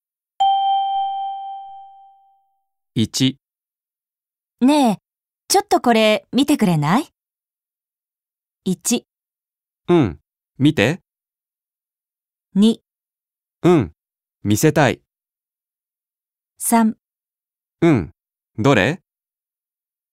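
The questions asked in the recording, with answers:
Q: ねえ、ちょっとこれ見てくれない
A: 3: うん、どれ?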